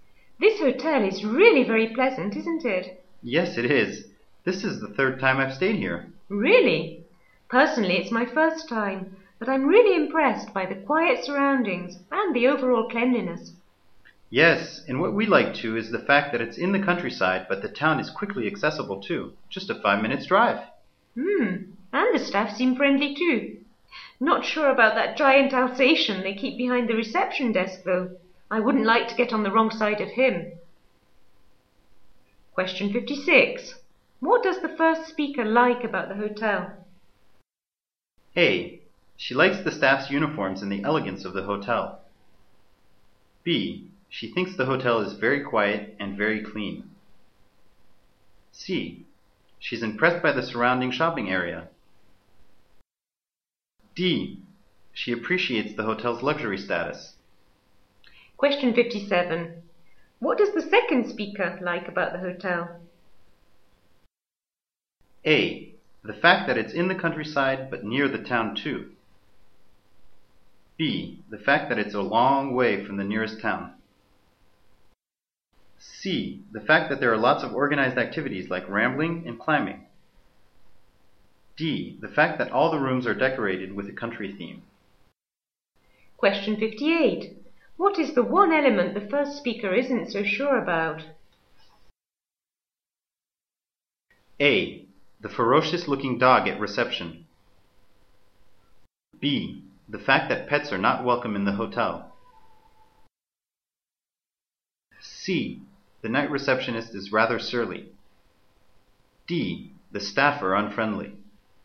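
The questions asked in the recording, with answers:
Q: What does the first speaker like about the hotel?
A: B: She thinks the hotel is very quiet and very clean.

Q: What does the second speaker like about the hotel?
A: A: The fact that it's in the countryside but near the town too.

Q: What is the one element the first speaker isn't so sure about?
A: A: The ferocious-looking dog at reception.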